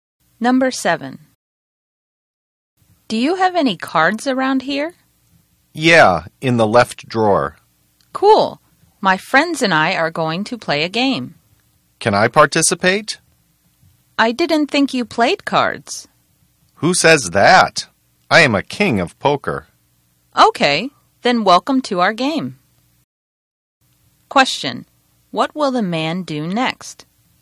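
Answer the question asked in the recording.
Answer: Play cards with the woman and her friends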